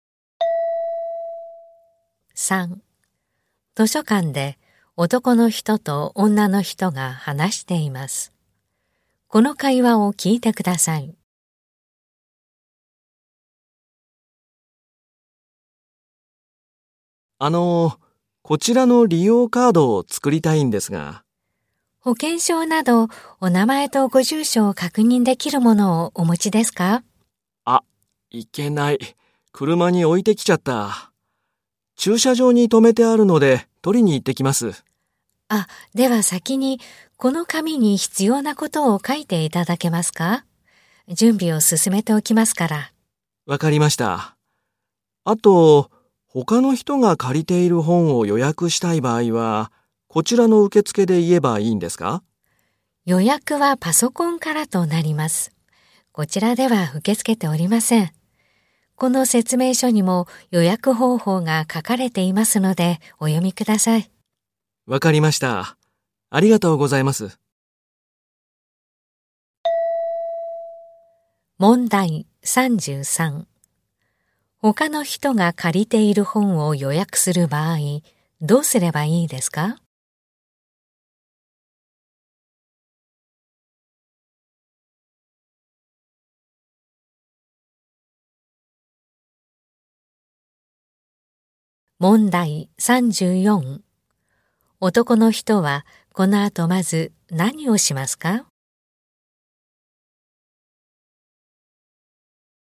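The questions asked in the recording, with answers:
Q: 他の人が借りている本を予約する場合、どうすればいいですか?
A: パソコンから予約する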